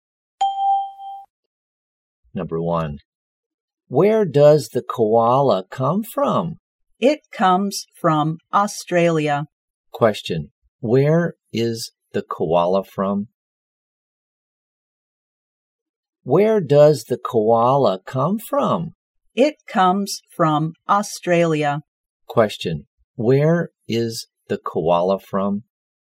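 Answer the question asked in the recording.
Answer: Australia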